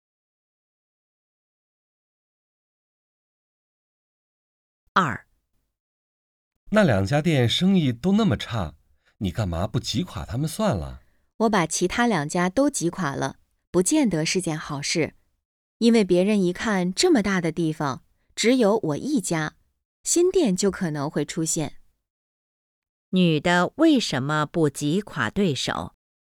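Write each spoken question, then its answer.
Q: 女的为什么不挤垮对手?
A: 怕挤垮其他两家后,新店可能会出现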